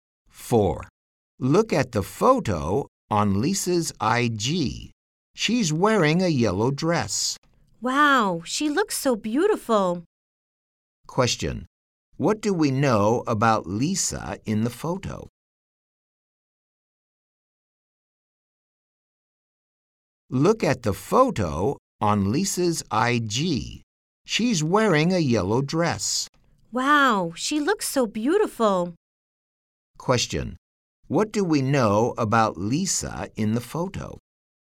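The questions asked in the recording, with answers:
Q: What do we know about Lisa in the photo?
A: She is wearing a yellow dress and looks beautiful.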